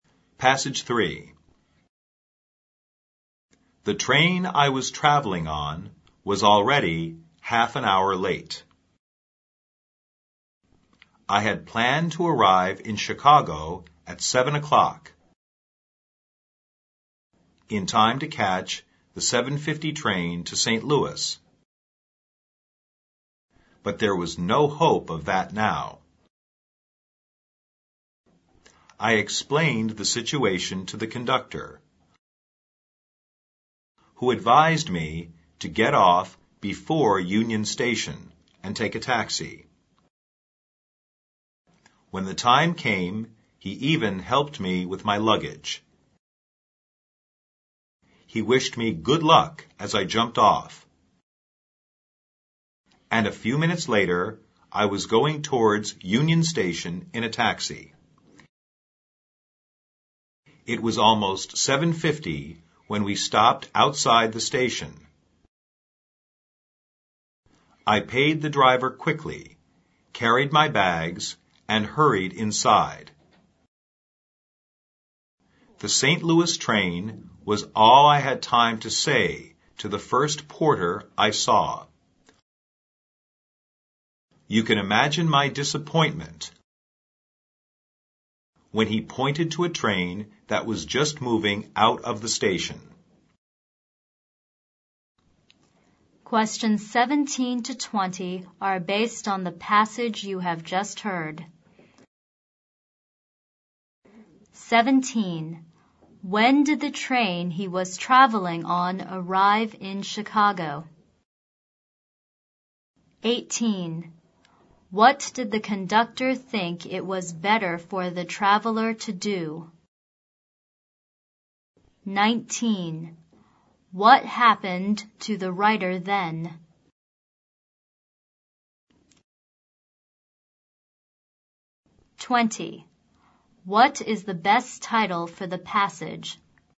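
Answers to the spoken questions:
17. Half an hour late, at about 7:30
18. Get off before Union Station and take a taxi
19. He missed the St. Louis train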